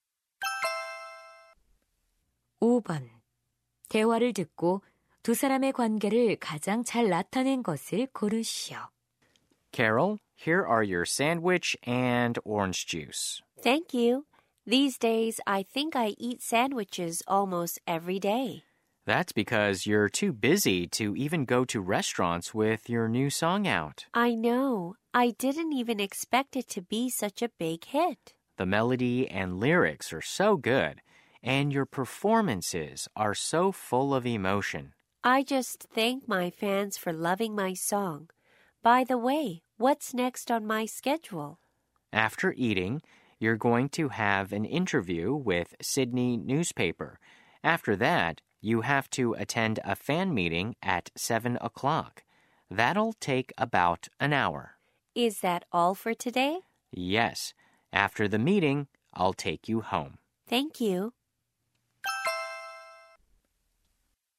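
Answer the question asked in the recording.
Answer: 가수 - 매니저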